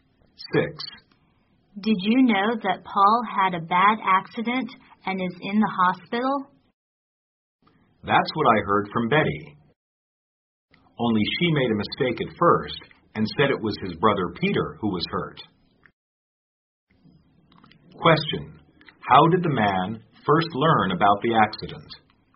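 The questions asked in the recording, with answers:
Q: How did the man first learn about the accident?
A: From Betty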